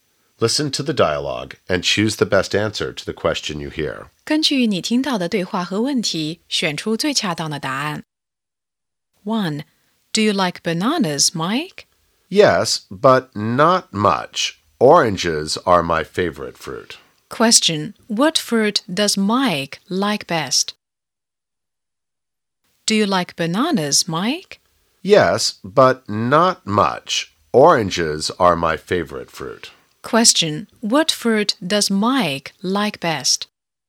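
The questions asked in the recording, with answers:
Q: What fruit does Mike like best?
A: Oranges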